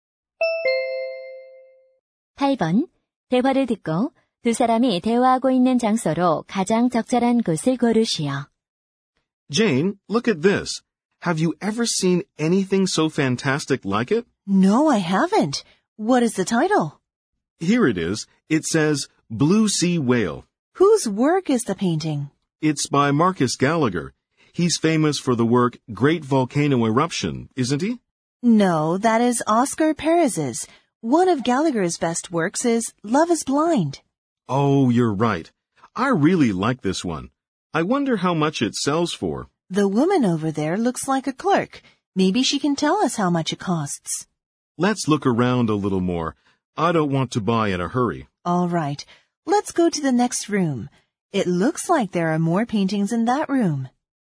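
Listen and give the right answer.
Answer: 미술품 갤러리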